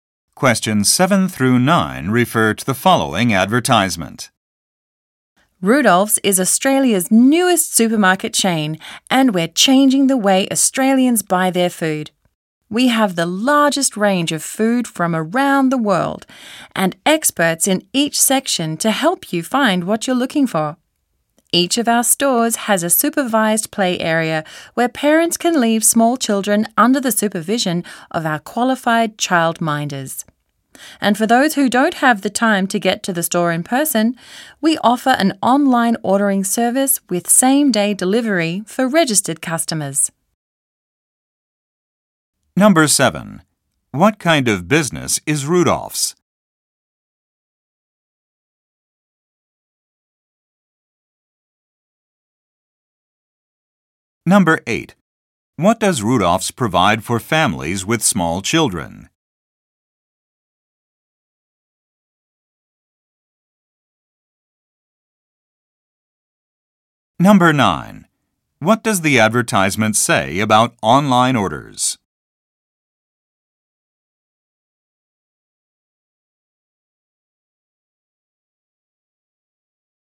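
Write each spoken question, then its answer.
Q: What kind of business is Rudolph's?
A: A supermarket chain

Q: What does Rudolph's provide for families with small children?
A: A supervised play area

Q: What does the advertisement say about online orders?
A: Registered customers get same-day delivery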